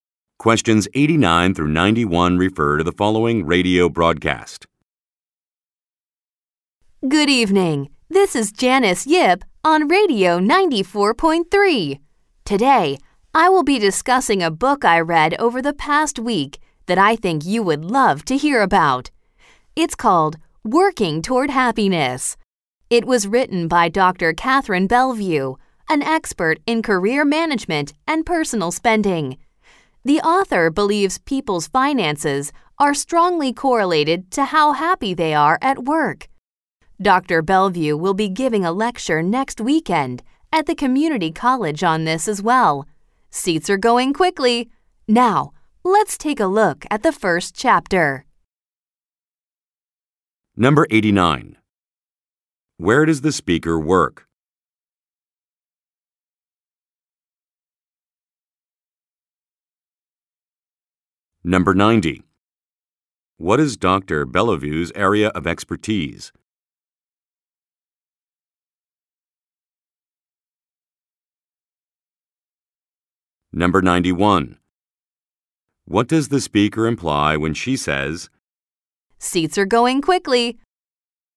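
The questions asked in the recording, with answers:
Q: Where does the speaker work?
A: At a radio station (Radio 94.3)

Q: What is Dr. Bellevue's area of expertise?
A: Career management and personal spending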